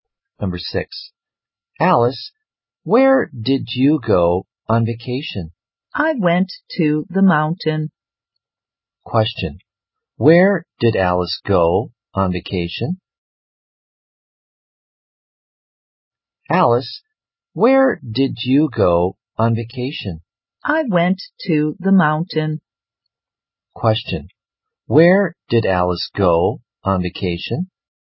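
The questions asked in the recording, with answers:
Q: where did Alice go on vacation?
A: To the mountain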